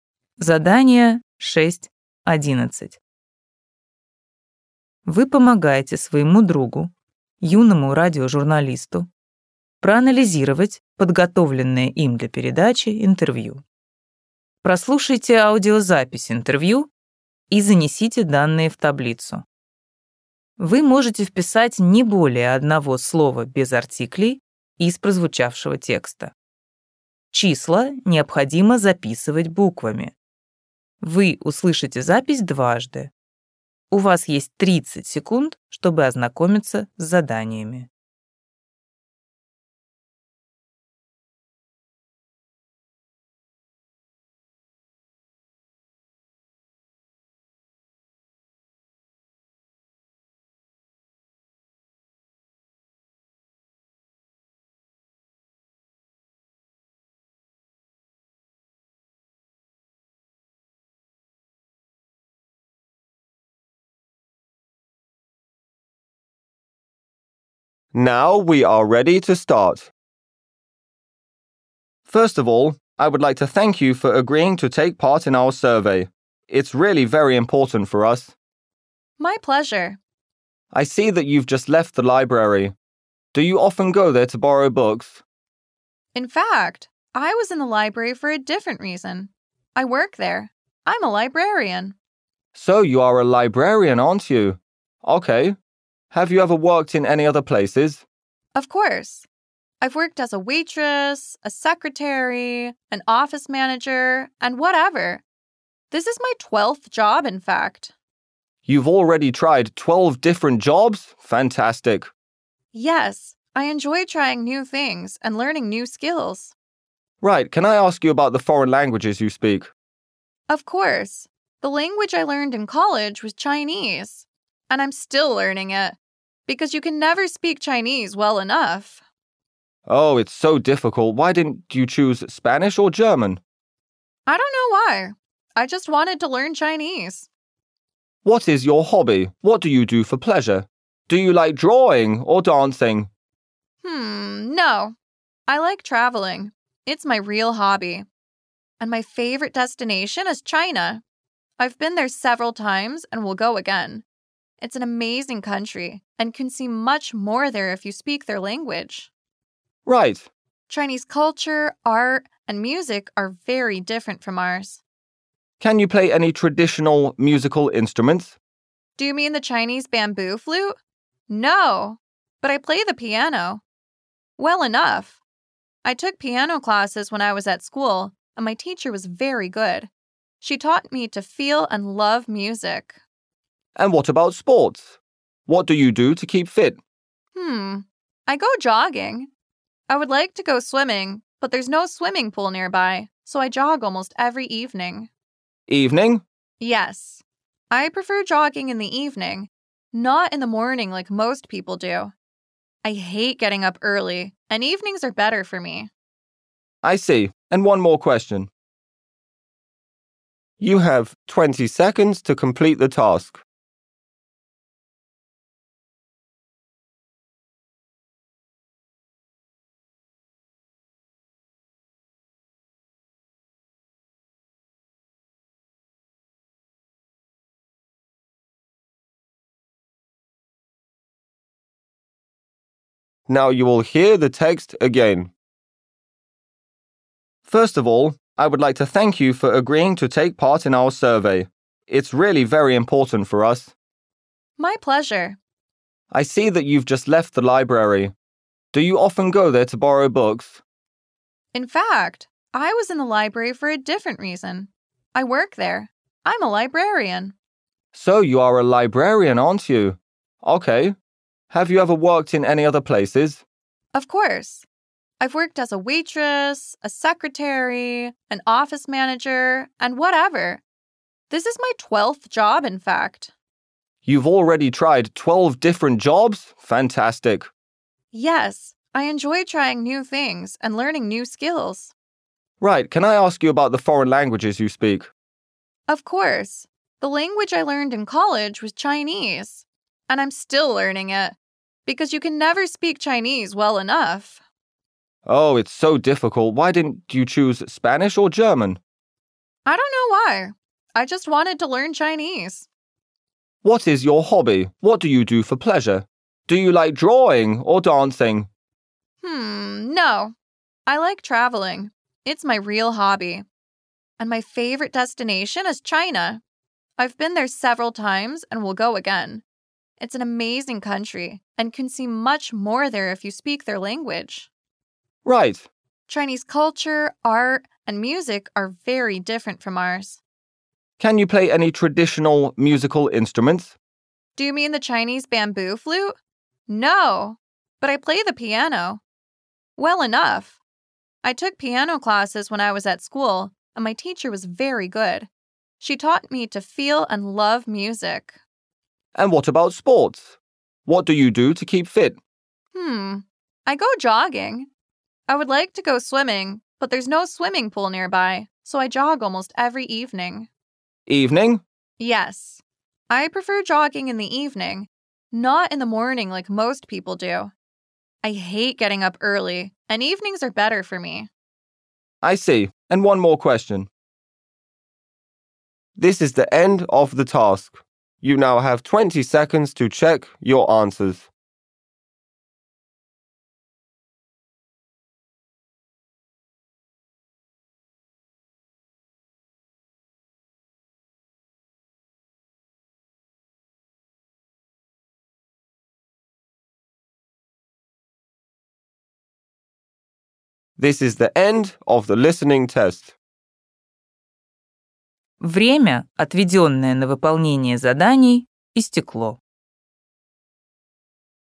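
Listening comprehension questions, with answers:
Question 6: Current job ___________________________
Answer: librarian

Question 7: Number of jobs he/she has done ___________________________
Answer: twelve

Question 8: The foreign language he/she speaks ___________________________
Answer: Chinese

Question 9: Hobby ___________________________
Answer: traveling

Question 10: The musical instrument he/she plays ___________________________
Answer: piano

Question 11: Regular sports activity ___________________________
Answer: jogging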